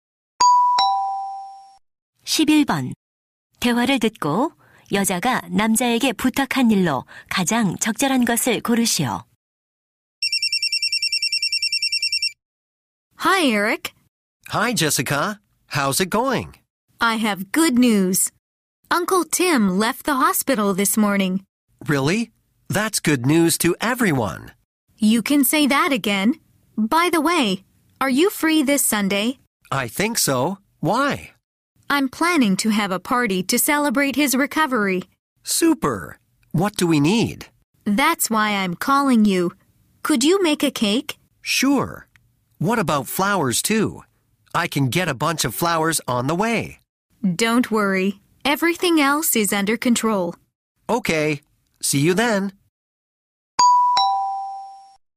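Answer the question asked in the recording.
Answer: 케이크 만들기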